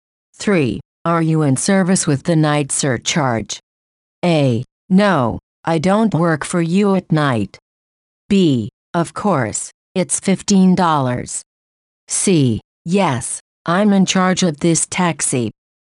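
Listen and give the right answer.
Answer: B: Of course, it's $15.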